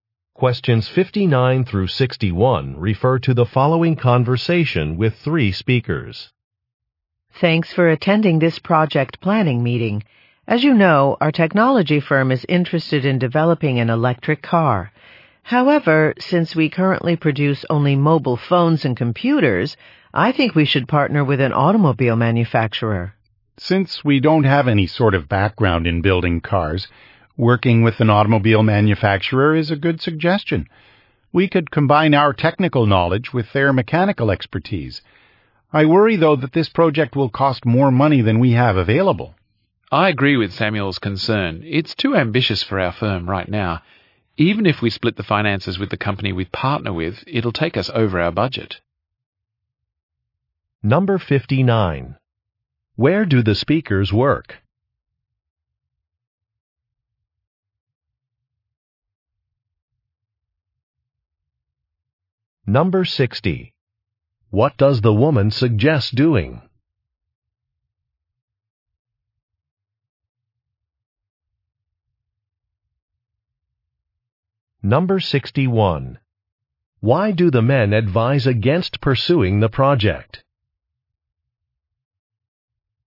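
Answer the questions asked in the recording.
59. At a technology firm
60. Partnering with an automobile manufacturer
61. It would cost more than their budget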